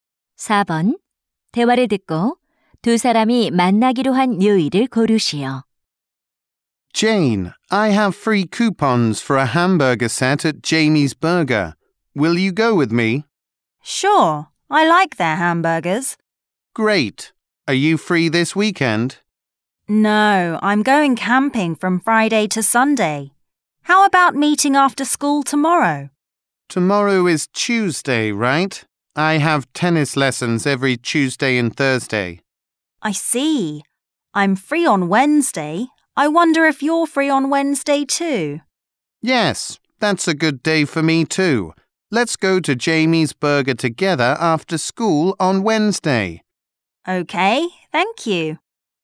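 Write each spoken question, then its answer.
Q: 대화를 듣고 두 사람이 만나기로 한 요일을 고르시오.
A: 수요일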